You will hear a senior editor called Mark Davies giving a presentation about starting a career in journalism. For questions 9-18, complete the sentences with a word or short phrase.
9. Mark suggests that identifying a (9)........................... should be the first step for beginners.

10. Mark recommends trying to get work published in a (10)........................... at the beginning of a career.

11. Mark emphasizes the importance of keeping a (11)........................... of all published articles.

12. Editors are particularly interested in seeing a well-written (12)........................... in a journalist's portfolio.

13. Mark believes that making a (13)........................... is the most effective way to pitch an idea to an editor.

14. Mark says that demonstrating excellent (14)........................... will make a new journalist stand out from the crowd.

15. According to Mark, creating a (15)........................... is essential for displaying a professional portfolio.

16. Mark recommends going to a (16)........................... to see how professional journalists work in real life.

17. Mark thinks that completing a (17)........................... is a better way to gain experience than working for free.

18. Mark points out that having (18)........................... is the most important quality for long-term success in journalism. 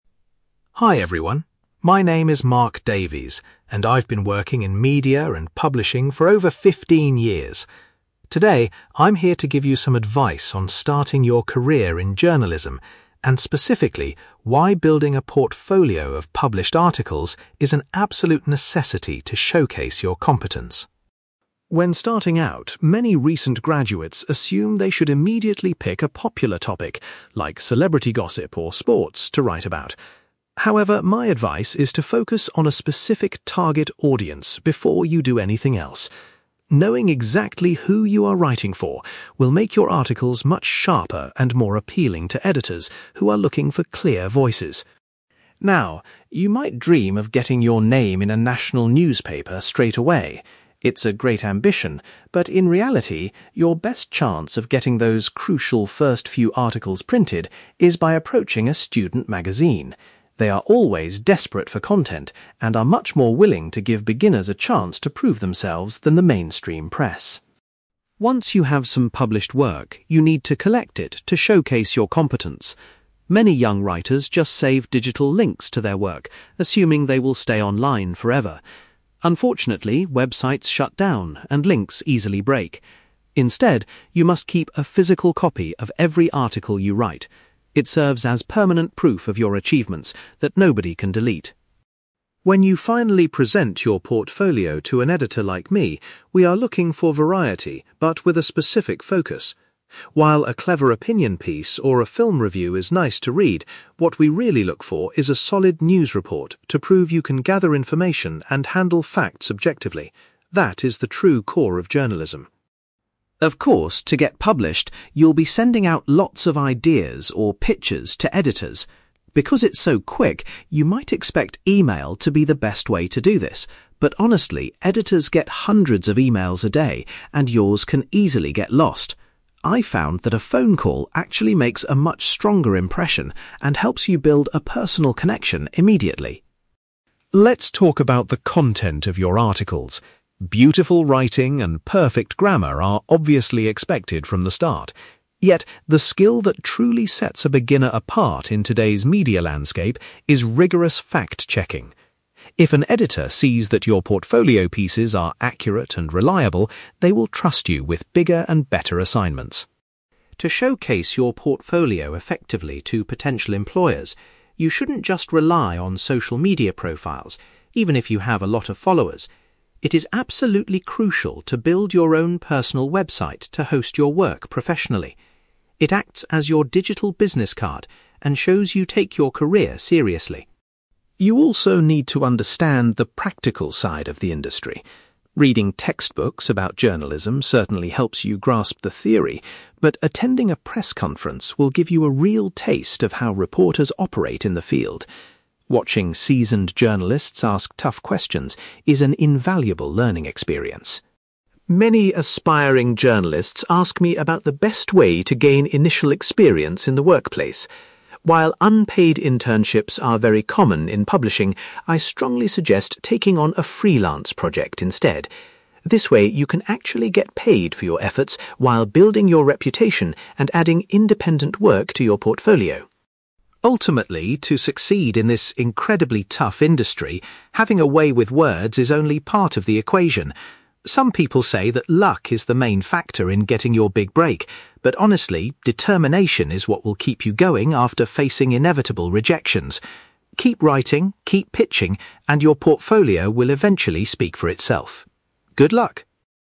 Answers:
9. target audience
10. student magazine
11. physical copy
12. news report
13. phone call
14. fact-checking
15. personal website
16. press conference
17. freelance project
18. determination

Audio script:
Mark Davies : Hi everyone. My name is Mark Davies, and I've been working in media and publishing for over fifteen years. Today, I'm here to give you some advice on starting your career in journalism, and specifically, why building a portfolio of published articles is an absolute necessity to showcase your competence.
When starting out, many recent graduates assume they should immediately pick a popular topic, like celebrity gossip or sports, to write about. However, my advice is to focus on a specific target audience before you do anything else. Knowing exactly who you are writing for will make your articles much sharper and more appealing to editors who are looking for clear voices.
Now, you might dream of getting your name in a national newspaper straight away. It's a great ambition, but in reality, your best chance of getting those crucial first few articles printed is by approaching a student magazine. They are always desperate for content and are much more willing to give beginners a chance to prove themselves than the mainstream press.
Once you have some published work, you need to collect it to showcase your competence. Many young writers just save digital links to their work, assuming they will stay online forever. Unfortunately, websites shut down and links easily break. Instead, you must keep a physical copy of every article you write. It serves as permanent proof of your achievements that nobody can delete.
When you finally present your portfolio to an editor like me, we are looking for variety, but with a specific focus. While a clever opinion piece or a film review is nice to read, what we really look for is a solid news report to prove you can gather information and handle facts objectively. That is the true core of journalism.
Of course, to get published, you'll be sending out lots of ideas, or 'pitches', to editors. Because it's so quick, you might expect email to be the best way to do this. But honestly, editors get hundreds of emails a day and yours can easily get lost. I've found that a phone call actually makes a much stronger impression and helps you build a personal connection immediately.
Let's talk about the content of your articles. Beautiful writing and perfect grammar are obviously expected from the start. Yet, the skill that truly sets a beginner apart in today's media landscape is rigorous fact-checking. If an editor sees that your portfolio pieces are accurate and reliable, they will trust you with bigger and better assignments.
To showcase your portfolio effectively to potential employers, you shouldn't just rely on social media profiles, even if you have a lot of followers. It is absolutely crucial to build your own personal website to host your work professionally. It acts as your digital business card and shows you take your career seriously.
You also need to understand the practical side of the industry. Reading textbooks about journalism certainly helps you grasp the theory, but attending a press conference will give you a real taste of how reporters operate in the field. Watching seasoned journalists ask tough questions is an invaluable learning experience.
Many aspiring journalists ask me about the best way to gain initial experience in the workplace. While unpaid internships are very common in publishing, I strongly suggest taking on a freelance project instead. This way, you can actually get paid for your efforts while building your reputation and adding independent work to your portfolio.
Ultimately, to succeed in this incredibly tough industry, having a way with words is only part of the equation. Some people say that luck is the main factor in getting your big break, but honestly, determination is what will keep you going after facing inevitable rejections. Keep writing, keep pitching, and your portfolio will eventually speak for itself. Good luck!

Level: B2